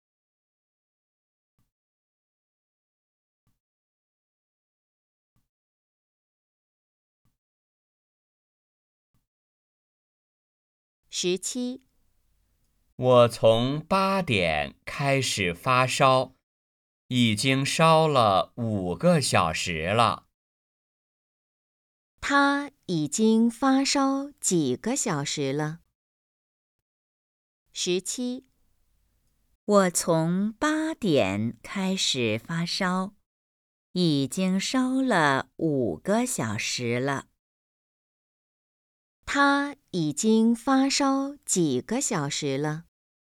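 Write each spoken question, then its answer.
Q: 他已经发烧几个小时了?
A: 5个小时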